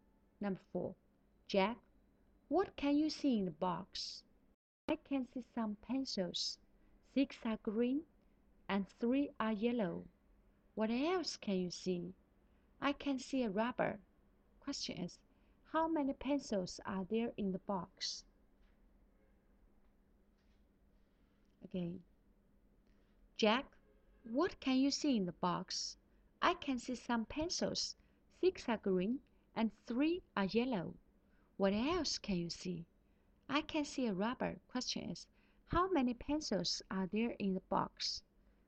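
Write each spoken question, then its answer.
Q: how many pencils are there in the box?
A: Nine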